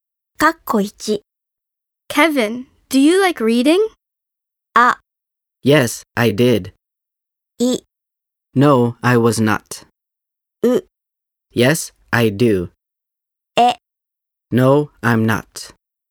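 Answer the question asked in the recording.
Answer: う: Yes, I do.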